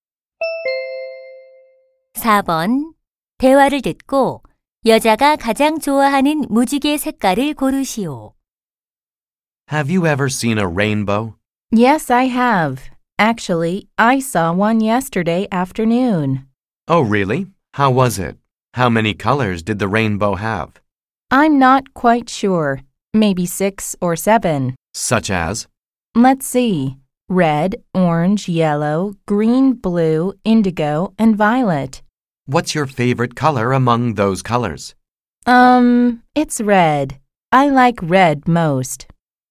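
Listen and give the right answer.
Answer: 빨간색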